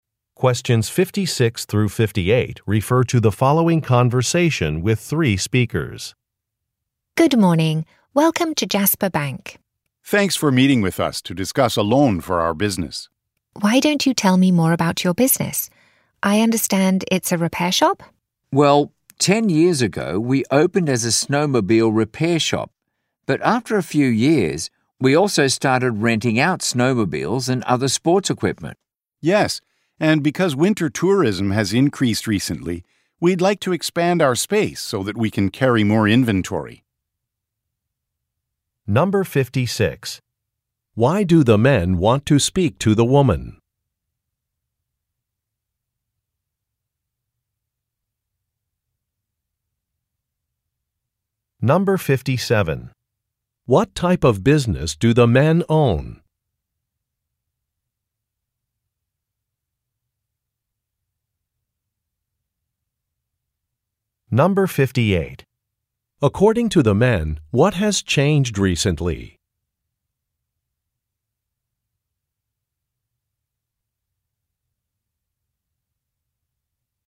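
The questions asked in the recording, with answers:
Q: Why do the men want to speak to the woman?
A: To discuss a loan for their business

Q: What type of business do the men own?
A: A snowmobile repair and sports equipment rental shop

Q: According to the men, what has changed recently?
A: Winter tourism has increased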